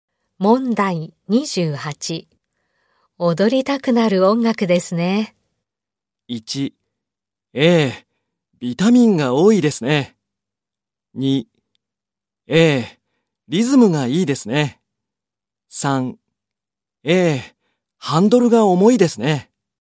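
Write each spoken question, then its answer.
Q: 踊りたくなる音楽ですね。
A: 2: ええ、リズムがいいですね。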